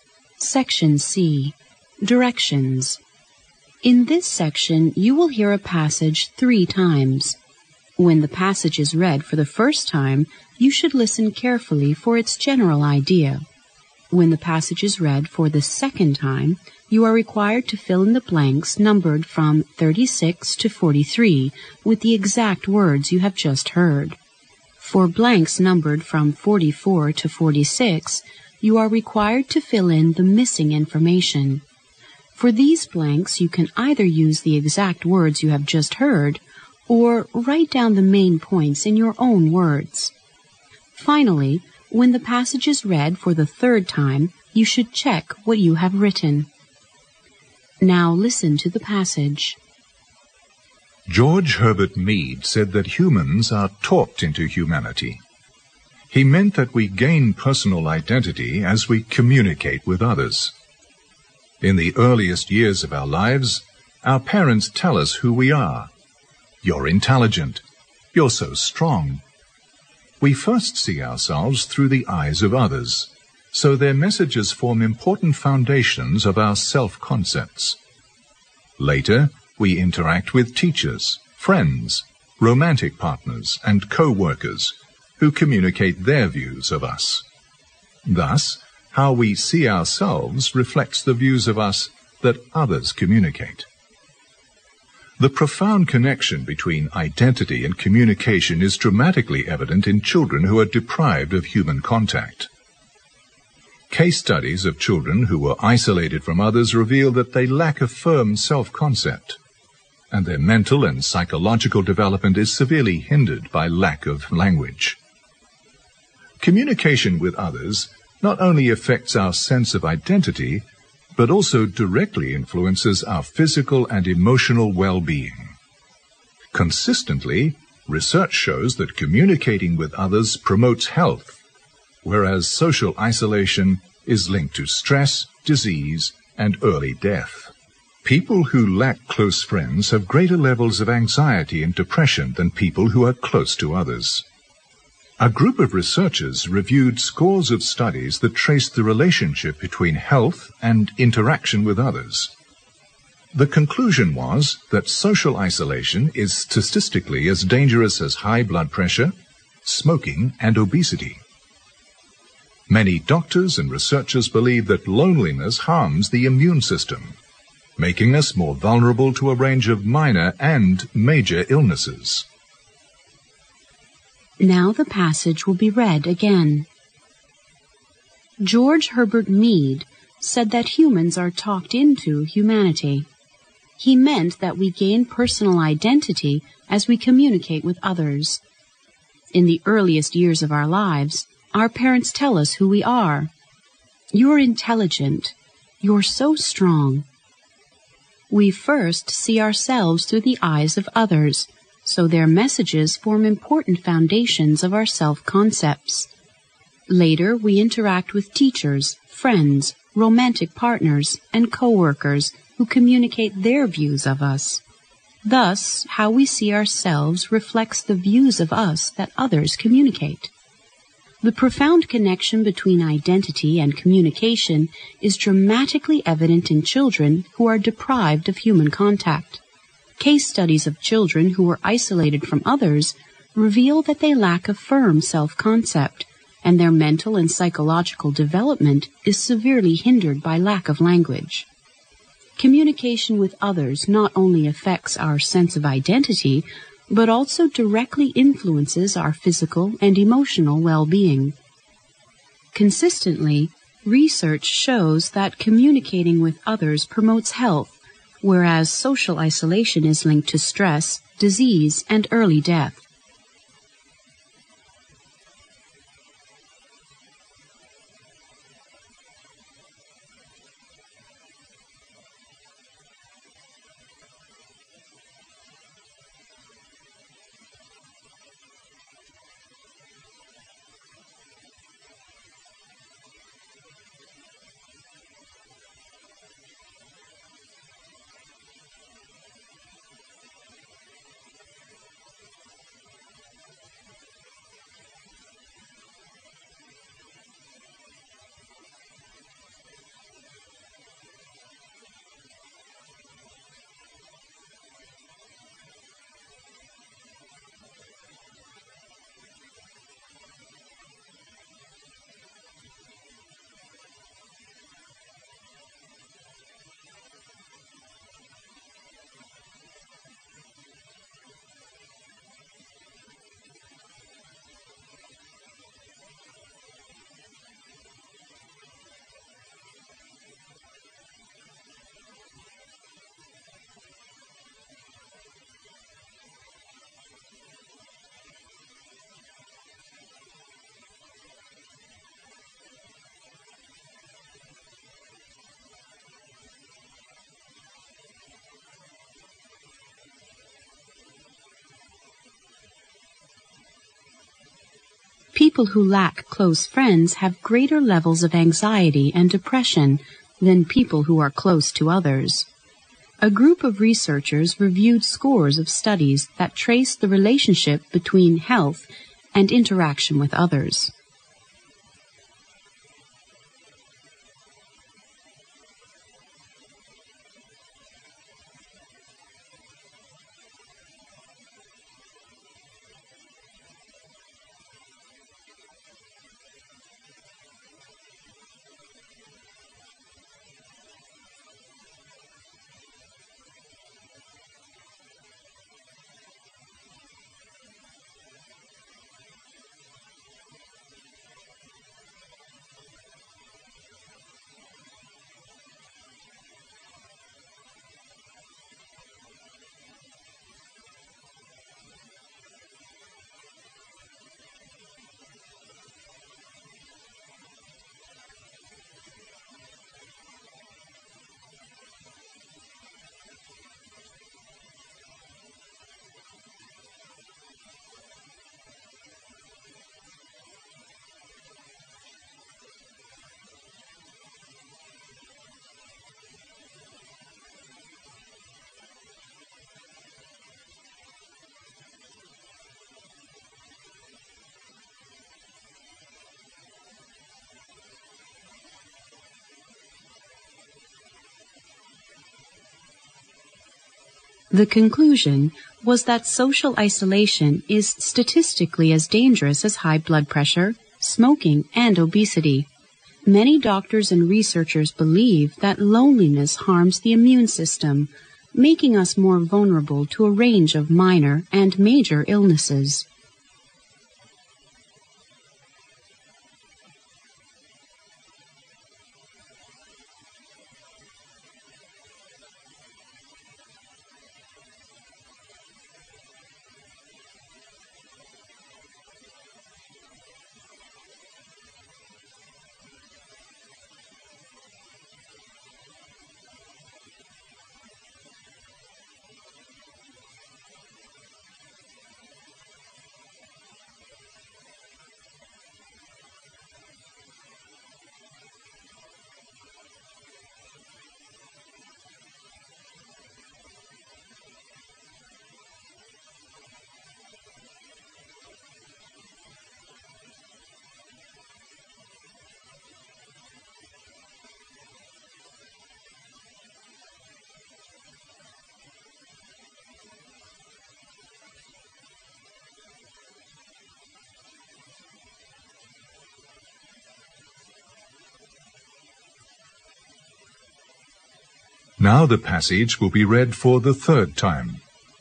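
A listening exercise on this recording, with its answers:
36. "You're (36) ______."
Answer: intelligent

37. We first see ourselves through the eyes of others, so their messages form important (37) ______ of our self-concepts.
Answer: foundations

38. Later we interact with teachers, friends, (38) ______ partners, and co-workers who communicate their views of us.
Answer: romantic

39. Thus, how we see ourselves (39) ______ the views of us that others communicate.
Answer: reflects

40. The (40) ______ connection between identity and communication is (41) ______ evident in children who are (42) ______ of human contact.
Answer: profound

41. The (40) ______ connection between identity and communication is (41) ______ evident in children who are (42) ______ of human contact.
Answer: dramatically

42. The (40) ______ connection between identity and communication is (41) ______ evident in children who are (42) ______ of human contact.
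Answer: deprived

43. Case studies of children who were isolated from others reveal that they lack a firm self-concept, and their mental and psychological development is severely (43) ______ by lack of language.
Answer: hindered

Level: 六级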